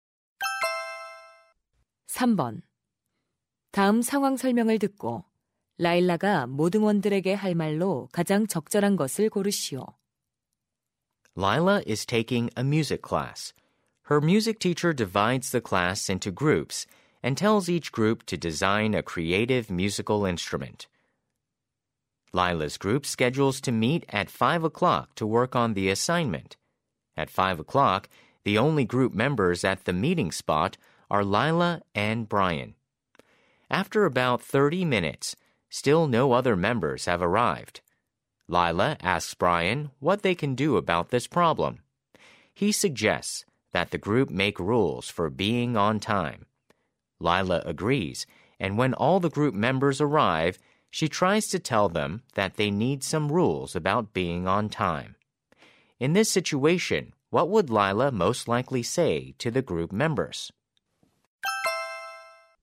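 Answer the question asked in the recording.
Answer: We need to make some rules about being on time.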